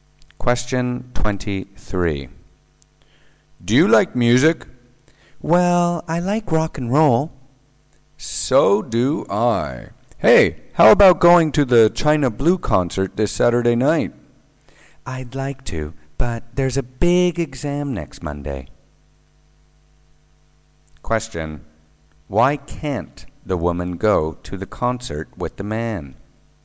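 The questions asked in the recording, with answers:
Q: Why can't the woman go to the concert with the man?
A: She has a big exam next Monday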